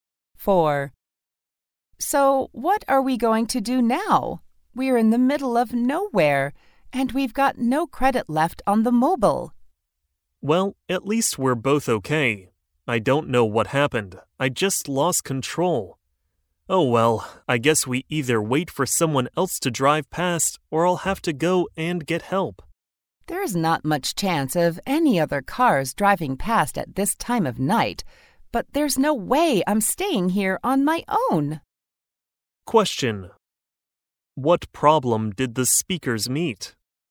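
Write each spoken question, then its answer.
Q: What problem did the speakers meet?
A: The driver lost control of the car at night and they are stranded in the middle of nowhere with no phone credit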